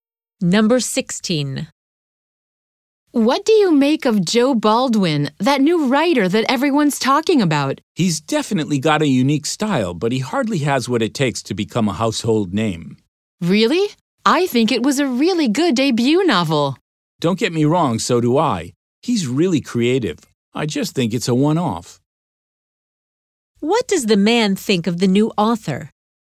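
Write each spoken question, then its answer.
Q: What does the man think of the new author?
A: His debut is good, but he won't become famous; it's a one-off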